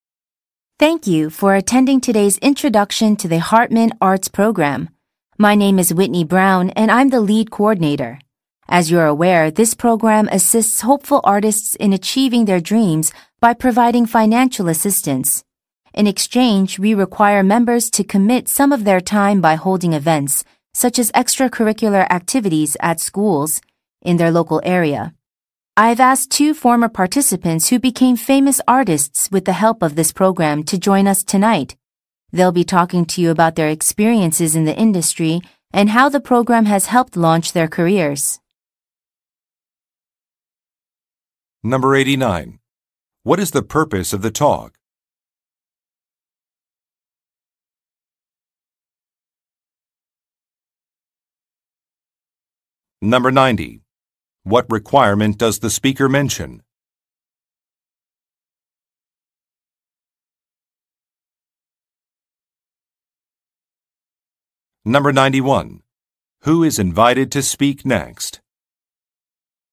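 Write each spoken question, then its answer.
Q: What is the purpose of the talk?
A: To introduce an arts program that gives money to artists

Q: What requirement does the speaker mention?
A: Members must spend time holding events, such as activities at local schools

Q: Who is invited to speak next?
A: Two former participants who became famous artists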